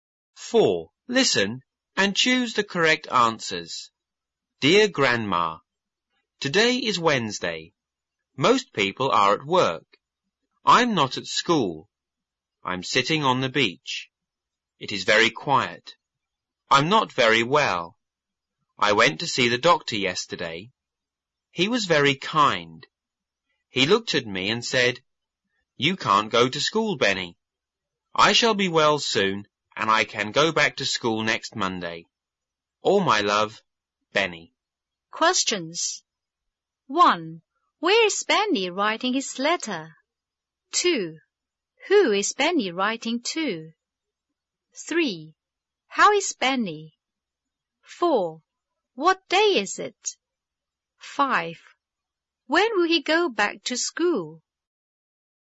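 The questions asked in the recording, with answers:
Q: Where is Benny writing his letter?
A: On the beach

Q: Who is Benny writing to?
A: His grandma

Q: How is Benny?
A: He is not very well

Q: What day is it?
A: Wednesday

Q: When will he go back to school?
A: Next Monday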